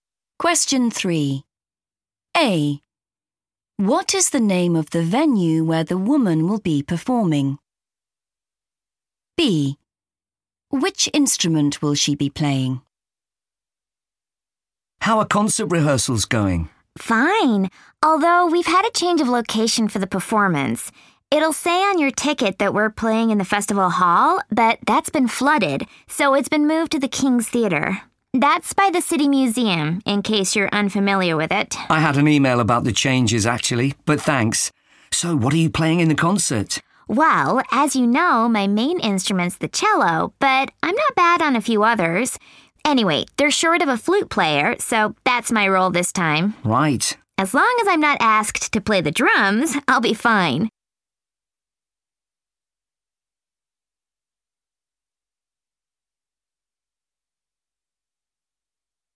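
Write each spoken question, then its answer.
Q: What is the name of the venue where the woman will be performing?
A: King's Theater

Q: Which instrument will she be playing?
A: flute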